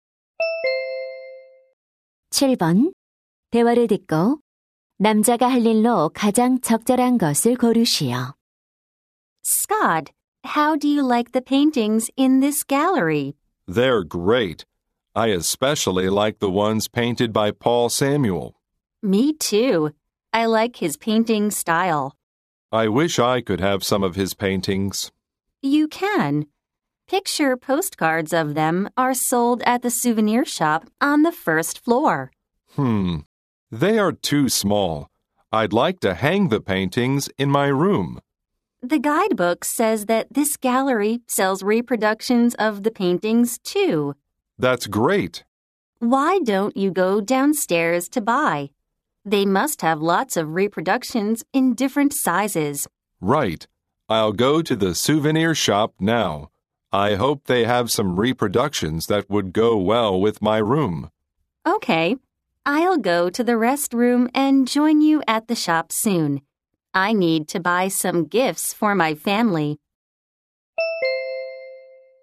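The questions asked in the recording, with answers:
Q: 대화를 듣고 남자가 할 일로 가장 적절한 것을 고르시오.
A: 기념품 가게에 가서 그림 복제품 사기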